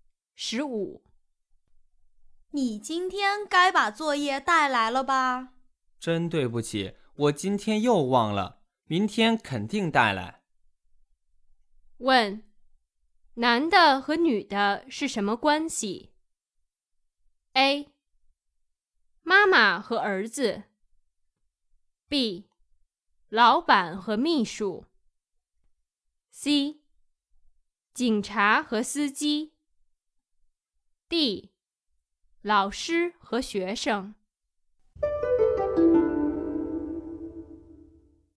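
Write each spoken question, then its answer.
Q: 问,男的和女的是什么关系? A. 妈妈和儿子。 B. 老板和秘书。 C. 警察和司机。 D. 老师和学生。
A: D: 老师和学生。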